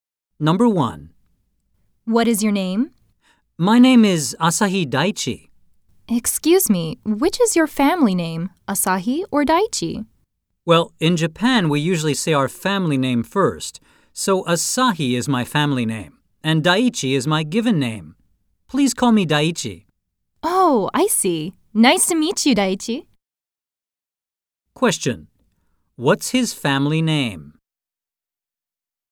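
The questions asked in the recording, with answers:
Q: What's his family name?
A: Asahi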